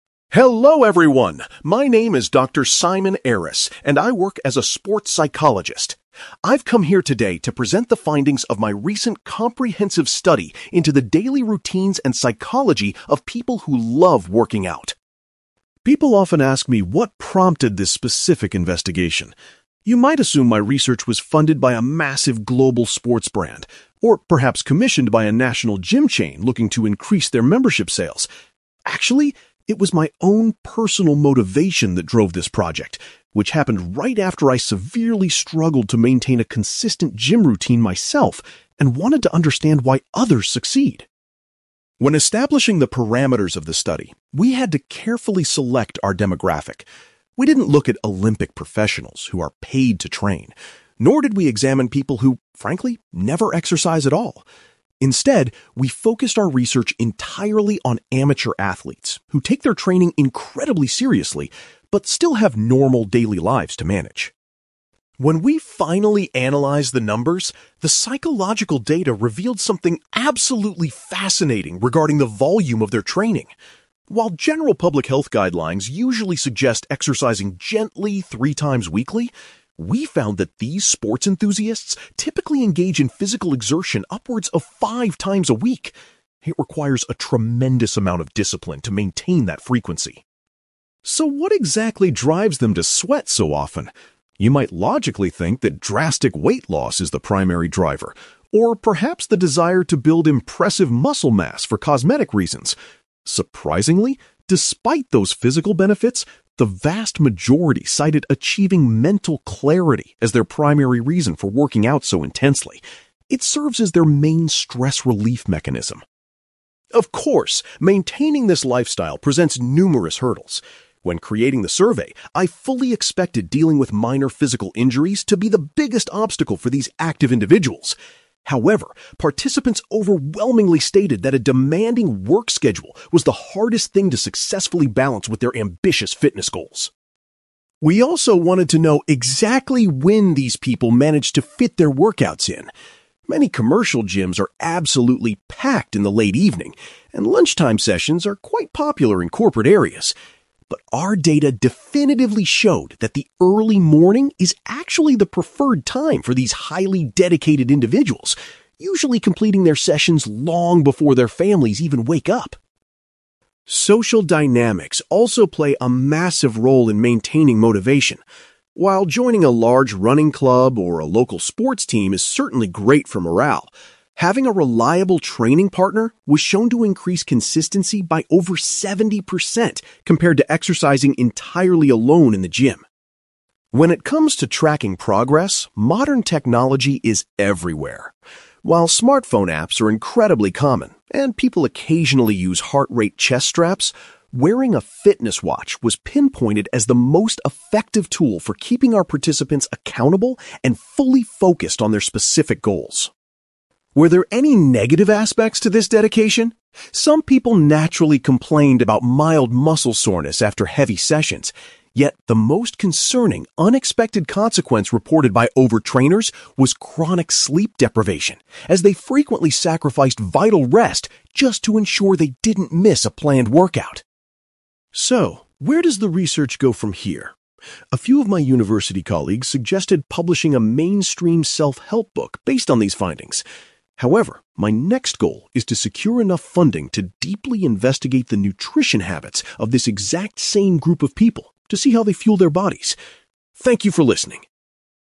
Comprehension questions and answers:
You will hear a sports psychologist called Simon giving a presentation about his research into the exercise habits of highly active people. For questions 9-18, complete the sentences with a word or short phrase.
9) Simon explains that his own (9)........................... was the real reason behind his research project.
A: personal motivation

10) Simon clarifies that the study specifically investigated the behaviour of (10)........................... .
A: amateur athletes

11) The psychological data demonstrated that highly active individuals usually work out at least (11)........................... weekly.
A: five times

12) Rather than physical goals, most participants stated that gaining (12)........................... was their main motivation.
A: mental clarity

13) Participants identified their busy (13)........................... as the most significant barrier to maintaining their routine.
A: work schedule

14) The study revealed that the (14)........................... is the most popular time for dedicated enthusiasts to exercise.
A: early morning

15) Simon notes that exercising with a (15)........................... greatly improves a person's chances of staying consistent.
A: training partner

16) Participants found that utilizing a (16)........................... helped them to remain accountable to their fitness targets.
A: fitness watch

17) Simon was worried to find that exercising too much often led to (17)........................... among the subjects.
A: sleep deprivation

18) In the future, Simon intends to study the (18)........................... of the people in this research group.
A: nutrition habits

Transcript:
Simon: Hello everyone. My name is Dr. Simon Aris, and I work as a sports psychologist. I've come here today to present the findings of my recent comprehensive study into the daily routines and psychology of people who love working out.
People often ask me what prompted this specific investigation. You might assume my research was funded by a massive global sports brand, or perhaps commissioned by a national gym chain looking to increase their membership sales. Actually, it was my own personal motivation that drove this project, which happened right after I severely struggled to maintain a consistent gym routine myself and wanted to understand why others succeed.
When establishing the parameters of the study, we had to carefully select our demographic. We didn't look at Olympic professionals who are paid to train, nor did we examine people who frankly never exercise at all. Instead, we focused our research entirely on amateur athletes who take their training incredibly seriously but still have normal daily lives to manage.
When we finally analysed the numbers, the psychological data revealed something absolutely fascinating regarding the volume of their training. While general public health guidelines usually suggest exercising gently three times weekly, we found that these sports enthusiasts typically engage in physical exertion upwards of five times a week. It requires a tremendous amount of discipline to maintain that frequency.
So, what exactly drives them to sweat so often? You might logically think that drastic weight loss is the primary driver, or perhaps the desire to build impressive muscle mass for cosmetic reasons. Surprisingly, despite those physical benefits, the vast majority cited achieving mental clarity as their primary reason for working out so intensely. It serves as their main stress relief mechanism.
Of course, maintaining this lifestyle presents numerous hurdles. When creating the survey, I fully expected dealing with minor physical injuries to be the biggest obstacle for these active individuals. However, participants overwhelmingly stated that a demanding work schedule was the hardest thing to successfully balance with their ambitious fitness goals.
We also wanted to know exactly when these people managed to fit their workouts in. Many commercial gyms are absolutely packed in the late evening, and lunchtime sessions are quite popular in corporate areas. But our data definitively showed that the early morning is actually the preferred time for these highly dedicated individuals, usually completing their sessions long before their families even wake up.
Social dynamics also play a massive role in maintaining motivation. While joining a large running club or a local sports team is certainly great for morale, having a reliable training partner was shown to increase consistency by over seventy percent compared to exercising entirely alone in the gym.
When it comes to tracking progress, modern technology is everywhere. While smartphone apps are incredibly common, and people occasionally use heart-rate chest straps, wearing a fitness watch was pinpointed as the most effective tool for keeping our participants accountable and fully focused on their specific goals.
Were there any negative aspects to this dedication? Some people naturally complained about mild muscle soreness after heavy sessions. Yet, the most concerning unexpected consequence reported by over-trainers was chronic sleep deprivation, as they frequently sacrificed vital rest just to ensure they didn't miss a planned workout.
So, where does the research go from here? A few of my university colleagues suggested publishing a mainstream self-help book based on these findings. However, my next goal is to secure enough funding to deeply investigate the nutrition habits of this exact same group of people to see how they fuel their bodies. Thank you for listening!

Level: B2